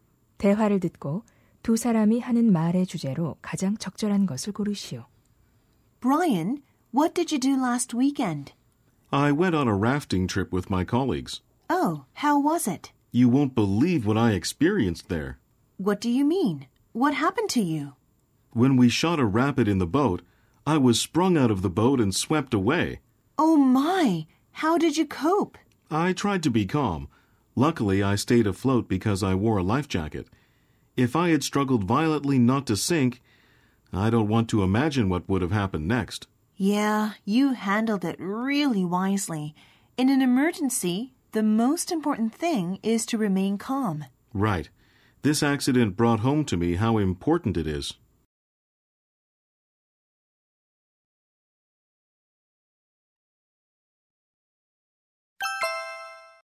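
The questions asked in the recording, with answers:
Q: 대화를 듣고 두 사람이 하는 말의 주제로 가장 적절한 것을 고르시오.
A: 비상 상황에서 침착함을 유지하는 것의 중요성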